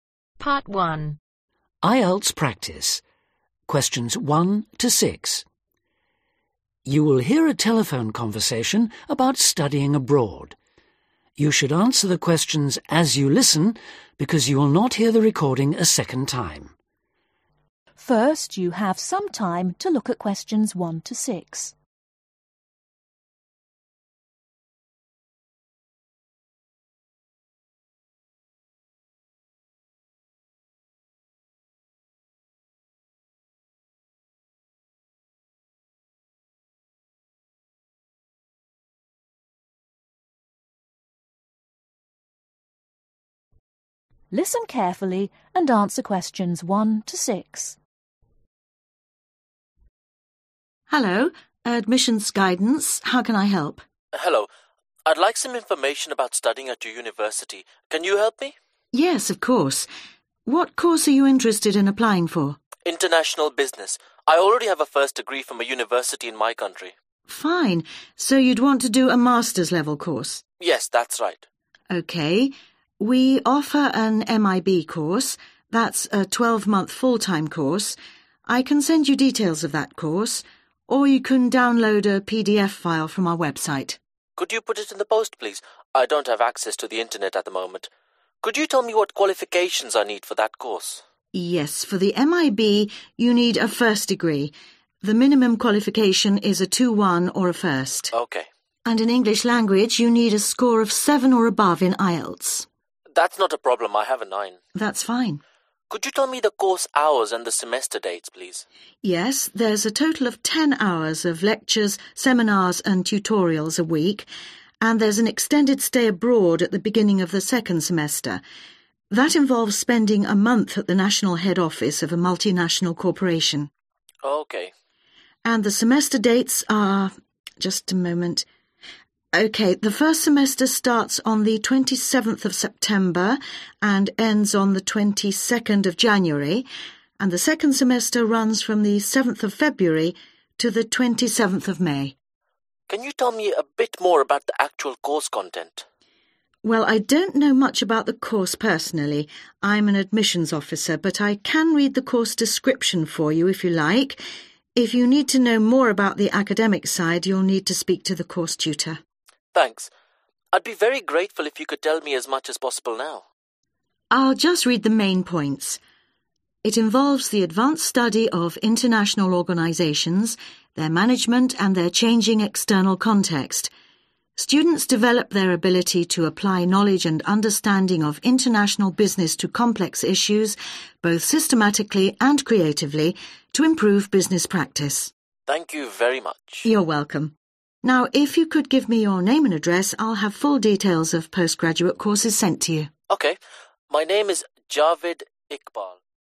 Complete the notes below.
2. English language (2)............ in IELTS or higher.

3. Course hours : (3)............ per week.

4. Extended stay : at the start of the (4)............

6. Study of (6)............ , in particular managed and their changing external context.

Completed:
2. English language 7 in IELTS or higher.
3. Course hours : Ten Hours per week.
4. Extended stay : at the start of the Second Semester
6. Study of International Organizations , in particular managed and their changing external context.